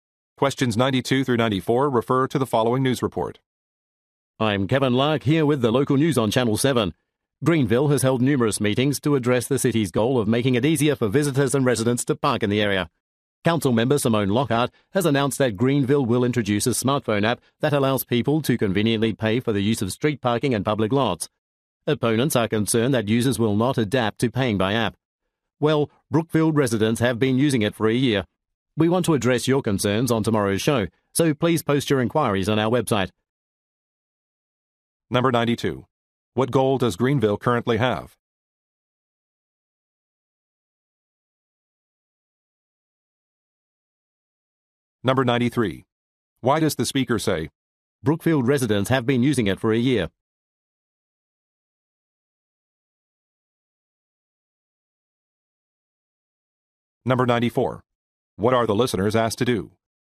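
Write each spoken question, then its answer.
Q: What goal does Greenville currently have?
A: Making parking easier

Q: Brookfield residents have been using it for a year?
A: To suggest users can adapt to the app

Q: What are the listeners asked to do?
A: Post inquiries on the website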